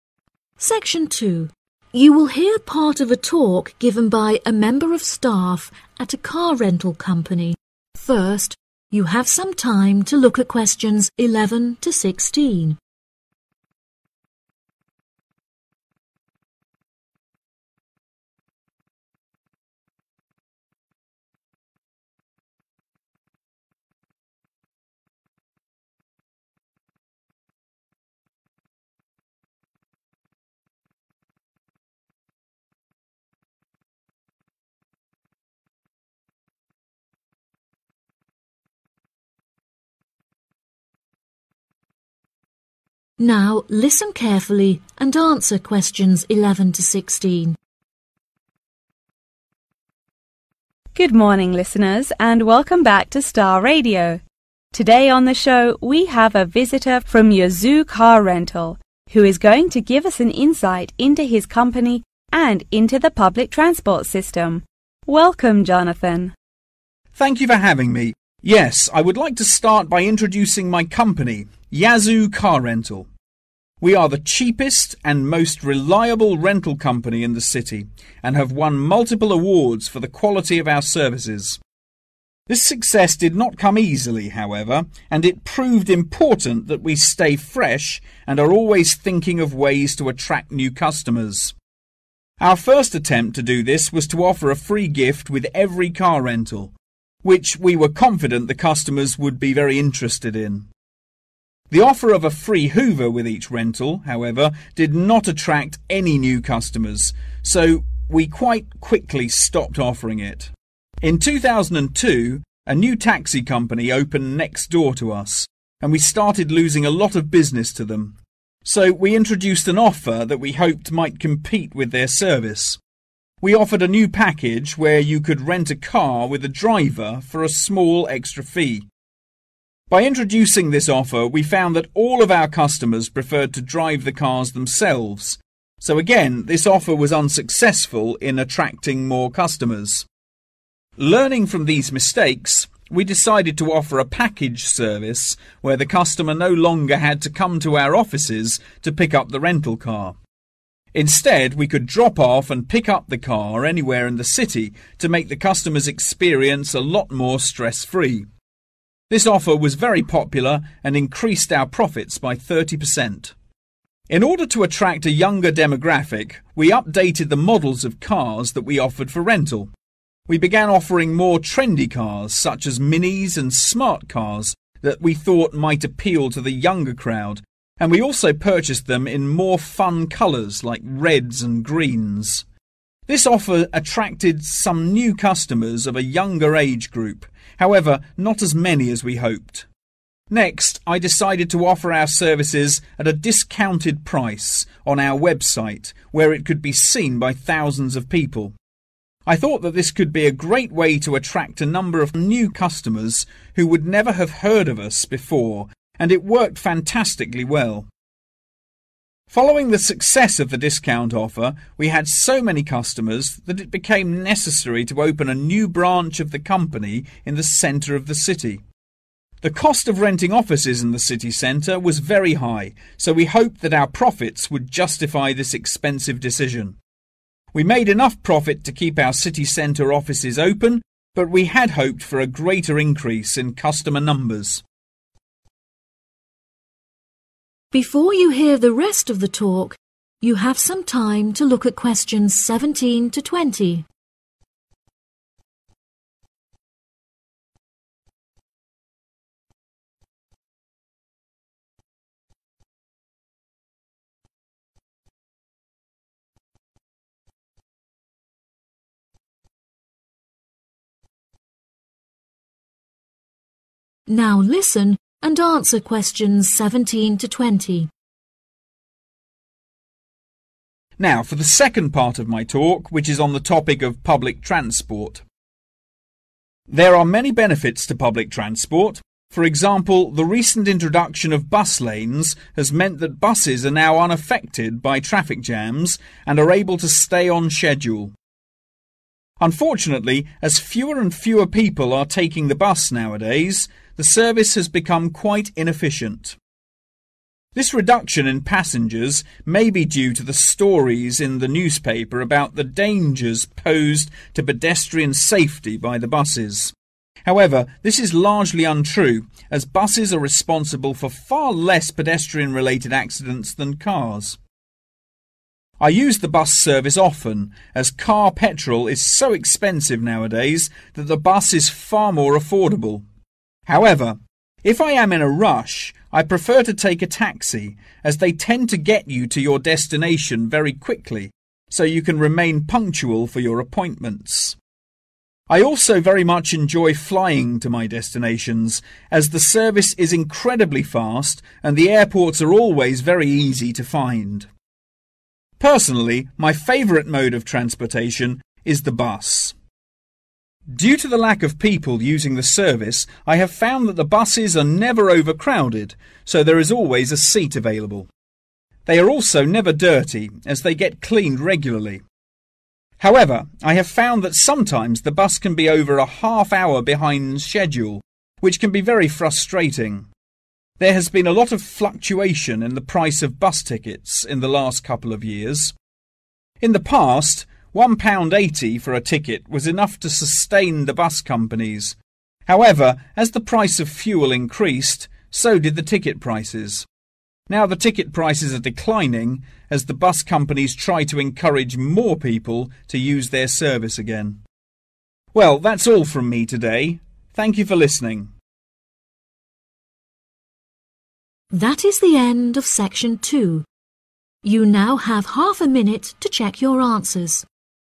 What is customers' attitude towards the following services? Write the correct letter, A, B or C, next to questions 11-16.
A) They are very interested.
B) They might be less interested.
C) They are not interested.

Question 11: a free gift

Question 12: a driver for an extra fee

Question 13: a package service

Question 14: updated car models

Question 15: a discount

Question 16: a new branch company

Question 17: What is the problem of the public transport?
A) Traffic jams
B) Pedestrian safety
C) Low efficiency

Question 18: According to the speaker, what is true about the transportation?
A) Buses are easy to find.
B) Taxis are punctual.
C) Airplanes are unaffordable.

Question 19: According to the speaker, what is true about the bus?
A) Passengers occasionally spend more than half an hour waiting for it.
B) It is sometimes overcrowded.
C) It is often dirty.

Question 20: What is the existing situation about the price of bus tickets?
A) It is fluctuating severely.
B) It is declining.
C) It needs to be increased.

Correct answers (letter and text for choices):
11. C) They are not interested.
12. C) They are not interested.
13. A) They are very interested.
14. B) They might be less interested.
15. A) They are very interested.
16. B) They might be less interested.
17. C) Low efficiency
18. B) Taxis are punctual.
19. A) Passengers occasionally spend more than half an hour waiting for it.
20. B) It is declining.